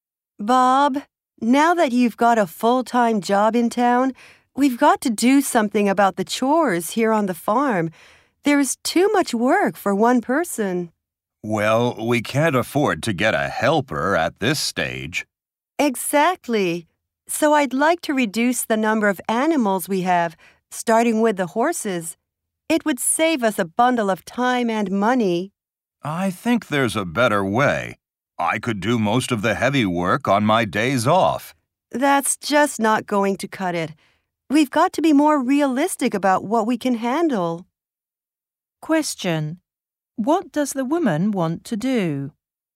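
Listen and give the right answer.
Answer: Reduce the number of animals on the farm, starting with the horses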